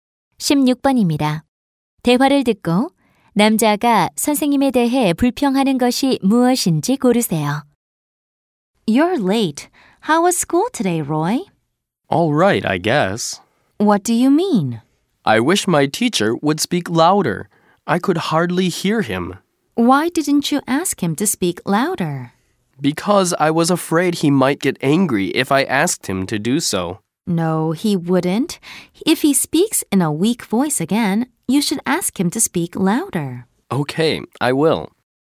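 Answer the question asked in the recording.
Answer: 목소리가 너무 작음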